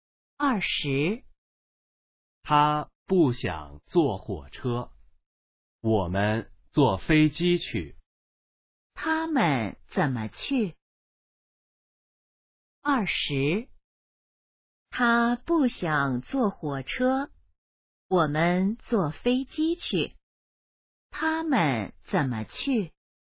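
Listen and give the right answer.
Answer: 坐飞机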